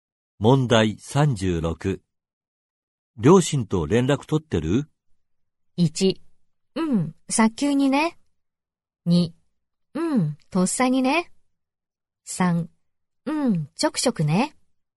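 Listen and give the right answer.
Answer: 3: うん、ちょくちょくね。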